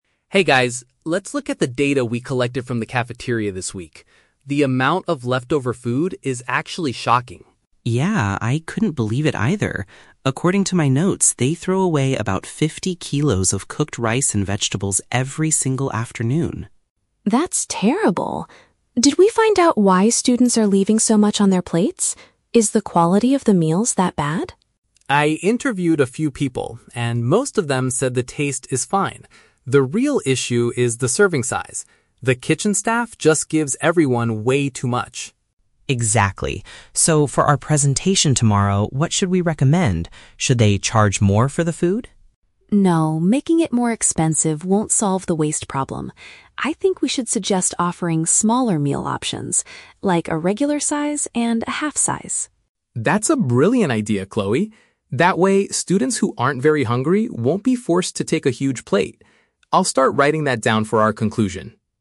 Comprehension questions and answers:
Listen to the conversation between three university students, then choose the correct answer (A, B, or C) for each question.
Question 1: What did the group discover about the cafeteria food?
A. A large quantity of it is discarded daily.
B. It tastes much worse than it used to.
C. It is too expensive for most students.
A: A large quantity of it is discarded daily.

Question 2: According to Alex, why are students not finishing their meals?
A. Because the kitchen staff cooks the vegetables badly.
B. Because they prefer eating at restaurants outside.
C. Because they are given too much food at once.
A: Because they are given too much food at once.

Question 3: What solution does Chloe propose for their presentation?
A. Increasing the price of the cafeteria meals.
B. Providing choices for smaller portions.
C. Forcing students to eat everything on their plates.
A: Providing choices for smaller portions.

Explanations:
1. Ben states that they "throw away about fifty kilos... every single afternoon." Option (A) paraphrases this as "A large quantity of it is discarded daily." Option (B) is a trap; Chloe asks if the quality is bad, but Alex says "the taste is fine." Option (C) is a trap; the price is mentioned later by Ben as a possible solution, not a discovery about the current situation.
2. Alex explains that the real issue is the "serving size" and the staff "gives everyone way too much." Option (C) is a paraphrase of this reason. Option (A) is a trap; "vegetables" are mentioned by Ben as part of the wasted food, but no one says they are cooked badly. Option (B) is plausible in real life but is never mentioned in the audio.
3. Chloe says, "I think we should suggest offering smaller meal options. Like, a regular size and a half-size." Option (B) uses the synonym "portions" for "meal options / sizes". Option (A) is a trap; Ben asks "Should they charge more?", but Chloe immediately rejects this idea ("No, making it more expensive won't solve..."). Option (C) is a trap using words from the audio; Alex says students "won't be forced to take a huge plate", meaning forcing them is not the goal.

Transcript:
Alex: Hey guys, let's look at the data we collected from the cafeteria this week. The amount of leftover food is actually shocking.
Ben: Yeah, I couldn't believe it either. According to my notes, they throw away about fifty kilos of cooked rice and vegetables every single afternoon.
Chloe: That's terrible. Did we find out why students are leaving so much on their plates? Is the quality of the meals that bad?
Alex: I interviewed a few people, and most of them said the taste is fine. The real issue is the serving size. The kitchen staff just gives everyone way too much.
Ben: Exactly. So, for our presentation tomorrow, what should we recommend? Should they charge more for the food?
Chloe: No, making it more expensive won't solve the waste problem. I think we should suggest offering smaller meal options. Like, a regular size and a half-size.
Alex: That's a brilliant idea, Chloe. That way, students who aren't very hungry won't be forced to take a huge plate. I'll start writing that down for our conclusion.

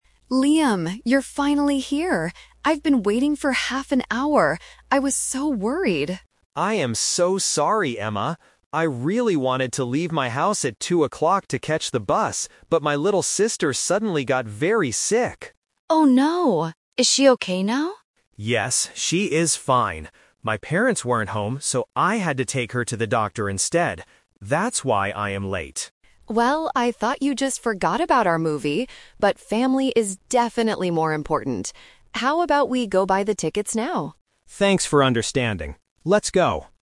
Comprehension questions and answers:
Listen to the conversation between two friends. Choose the correct answer (A, B, or C) for each question.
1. How long did Emma wait for Liam?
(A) 20 minutes.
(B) 30 minutes.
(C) 60 minutes.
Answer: 30 minutes.

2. Why was Liam late?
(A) He missed his bus.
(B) He forgot about the movie.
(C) He had to help his sick sister.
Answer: He had to help his sick sister.

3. Where did Liam go before meeting Emma?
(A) To the doctor.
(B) To the movie theater.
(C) To the bus station.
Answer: To the doctor.

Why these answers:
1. Emma says, "I've been waiting for half an hour." Half an hour is 30 minutes. Options (A) and (C) are incorrect numbers.
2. This is "The Twist". Liam planned to catch the bus, but his sister got sick. Option (A) is a trap because the "bus" is mentioned as his original plan, not the reason he was late. Option (B) is a trap because Emma thought he forgot about the movie, but that wasn't the real reason.
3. Liam explains his situation: "I had to take her to the doctor instead." Option (B) is where they are going now. Option (C) was part of his original plan that he didn't do.

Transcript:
Emma: Liam, you're finally here! I've been waiting for half an hour. I was so worried!
Liam: I am so sorry, Emma! I really wanted to leave my house at 2:00 to catch the bus, but my little sister suddenly got very sick.
Emma: Oh no! Is she okay now?
Liam: Yes, she is fine. My parents weren't home, so I had to take her to the doctor instead. That's why I am late.
Emma: Well, I thought you just forgot about our movie, but family is definitely more important. How about we go buy the tickets now?
Liam: Thanks for understanding. Let's go.

